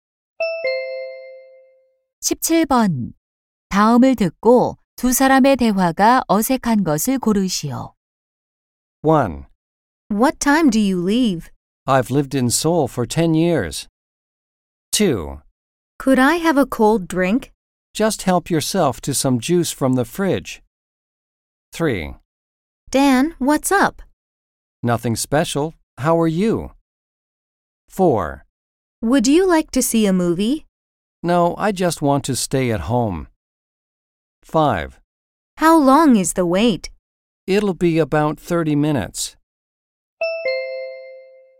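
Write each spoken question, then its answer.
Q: 다음을 듣고 두 사람의 대화가 어색한 것을 고르시오.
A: 1: What time do you leave? / I've lived in Seoul for 10 years.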